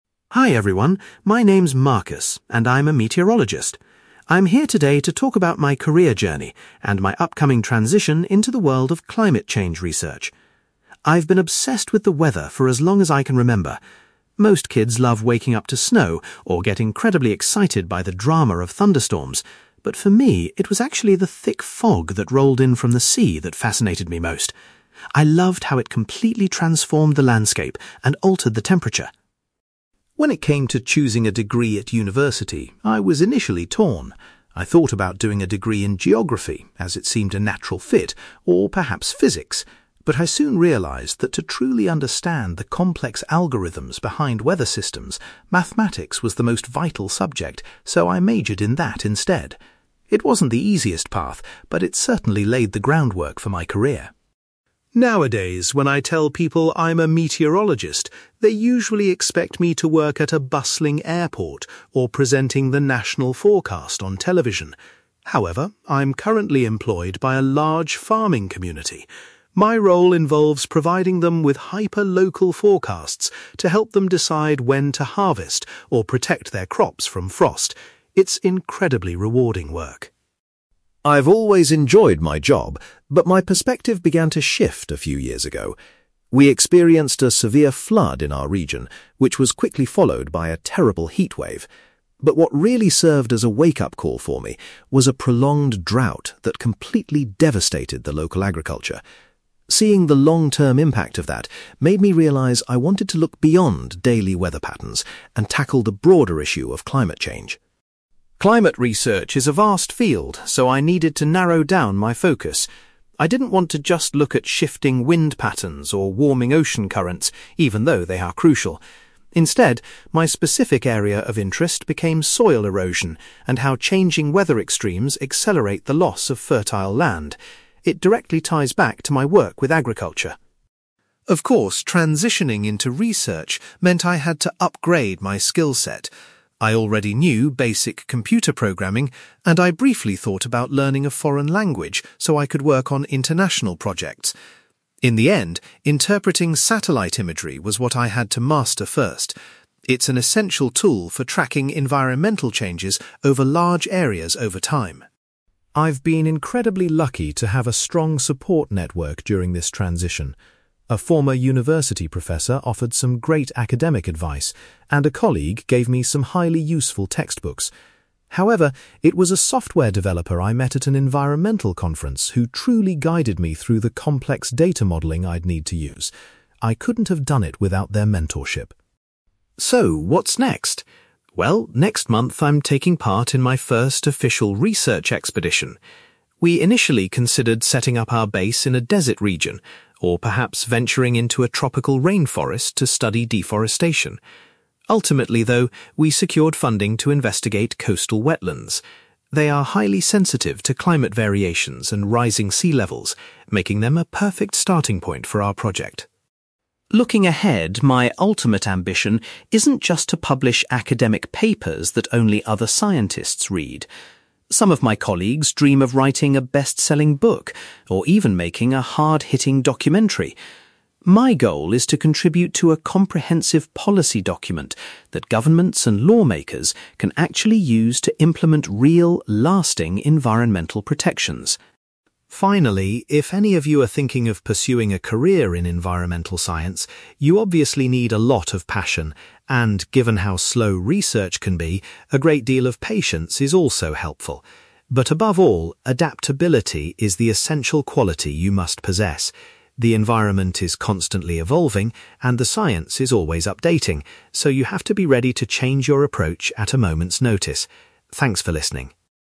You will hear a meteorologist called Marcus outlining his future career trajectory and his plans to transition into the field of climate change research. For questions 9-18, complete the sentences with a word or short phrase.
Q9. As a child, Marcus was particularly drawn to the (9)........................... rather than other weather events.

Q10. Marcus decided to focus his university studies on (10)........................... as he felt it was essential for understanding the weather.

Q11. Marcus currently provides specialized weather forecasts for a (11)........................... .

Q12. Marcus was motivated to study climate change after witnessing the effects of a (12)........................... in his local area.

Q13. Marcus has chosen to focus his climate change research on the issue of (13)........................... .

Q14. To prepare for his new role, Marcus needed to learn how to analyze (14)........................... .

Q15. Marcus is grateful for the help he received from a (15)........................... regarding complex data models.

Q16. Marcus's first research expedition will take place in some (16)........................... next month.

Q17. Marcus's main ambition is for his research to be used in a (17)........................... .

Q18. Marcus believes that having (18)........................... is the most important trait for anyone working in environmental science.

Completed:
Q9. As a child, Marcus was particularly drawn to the fog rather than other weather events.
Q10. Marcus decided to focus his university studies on mathematics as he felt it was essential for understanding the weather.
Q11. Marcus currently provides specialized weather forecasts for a farming community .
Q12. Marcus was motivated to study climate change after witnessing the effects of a prolonged drought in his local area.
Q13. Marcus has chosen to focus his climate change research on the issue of soil erosion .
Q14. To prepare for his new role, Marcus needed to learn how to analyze satellite imagery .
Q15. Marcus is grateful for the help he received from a software developer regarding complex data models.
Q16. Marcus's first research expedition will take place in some coastal wetlands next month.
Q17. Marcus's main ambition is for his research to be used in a policy document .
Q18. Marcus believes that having adaptability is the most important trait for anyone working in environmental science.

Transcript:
Marcus: Hi everyone, my name is Marcus, and I'm a meteorologist. I'm here today to talk about my career journey, and my upcoming transition into the world of climate change research. I've been obsessed with the weather for as long as I can remember. Most kids love waking up to snow, or get incredibly excited by the drama of thunderstorms, but for me, it was actually the thick fog that rolled in from the sea that fascinated me most. I loved how it completely transformed the landscape and altered the temperature.
When it came to choosing a degree at university, I was initially torn. I thought about doing a degree in geography, as it seemed a natural fit, or perhaps physics. But I soon realised that to truly understand the complex algorithms behind weather systems, mathematics was the most vital subject, so I majored in that instead. It wasn't the easiest path, but it certainly laid the groundwork for my career.
Nowadays, when I tell people I'm a meteorologist, they usually expect me to work at a bustling airport or presenting the national forecast on television. However, I'm currently employed by a large farming community. My role involves providing them with hyper-local forecasts to help them decide when to harvest or protect their crops from frost. It's incredibly rewarding work.
I've always enjoyed my job, but my perspective began to shift a few years ago. We experienced a severe flood in our region, which was quickly followed by a terrible heatwave. But what really served as a wake-up call for me was a prolonged drought that completely devastated the local agriculture. Seeing the long-term impact of that made me realize I wanted to look beyond daily weather patterns and tackle the broader issue of climate change.
Climate research is a vast field, so I needed to narrow down my focus. I didn't want to just look at shifting wind patterns or warming ocean currents, even though they are crucial. Instead, my specific area of interest became soil erosion, and how changing weather extremes accelerate the loss of fertile land. It directly ties back to my work with agriculture.
Of course, transitioning into research meant I had to upgrade my skill set. I already knew basic computer programming, and I briefly thought about learning a foreign language so I could work on international projects. In the end, interpreting satellite imagery was what I had to master first. It's an essential tool for tracking environmental changes over large areas over time.
I've been incredibly lucky to have a strong support network during this transition. A former university professor offered some great academic advice, and a colleague gave me some highly useful textbooks. However, it was a software developer I met at an environmental conference who truly guided me through the complex data modeling I'd need to use. I couldn't have done it without their mentorship.
So, what's next? Well, next month I'm taking part in my first official research expedition. We initially considered setting up our base in a desert region, or perhaps venturing into a tropical rainforest to study deforestation. Ultimately, though, we secured funding to investigate coastal wetlands. They are highly sensitive to climate variations and rising sea levels, making them a perfect starting point for our project.
Looking ahead, my ultimate ambition isn't just to publish academic papers that only other scientists read. Some of my colleagues dream of writing a bestselling book, or even making a hard-hitting documentary. My goal is to contribute to a comprehensive policy document that governments and lawmakers can actually use to implement real, lasting environmental protections.
Finally, if any of you are thinking of pursuing a career in environmental science, you obviously need a lot of passion. And, given how slow research can be, a great deal of patience is also helpful. But above all, adaptability is the essential quality you must possess. The environment is constantly evolving, and the science is always updating, so you have to be ready to change your approach at a moment's notice. Thanks for listening!

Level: B2